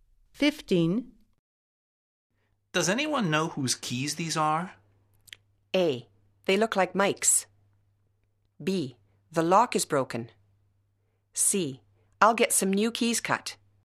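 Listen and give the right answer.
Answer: A: They look like Mike's.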